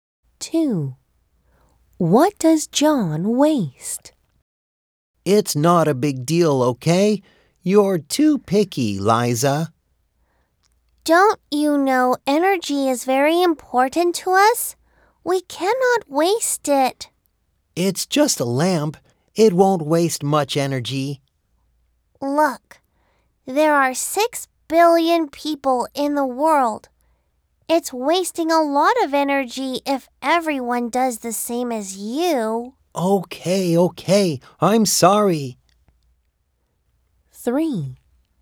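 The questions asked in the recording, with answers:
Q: What does John waste?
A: He wastes energy.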